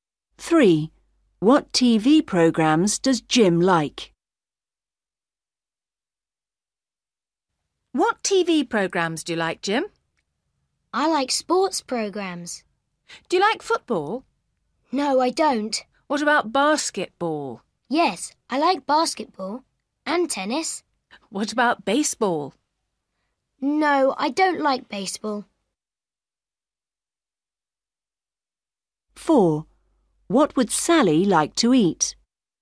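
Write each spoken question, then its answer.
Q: What TV programmes does Jim like?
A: Basketball and tennis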